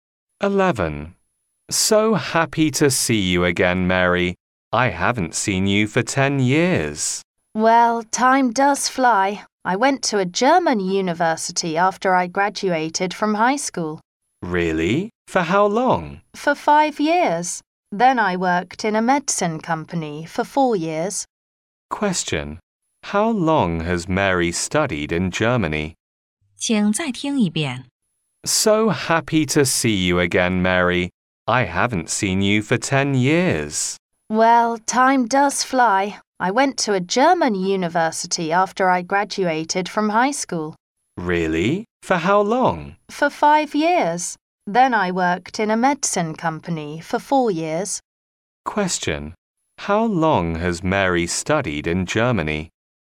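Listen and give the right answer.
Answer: For 5 years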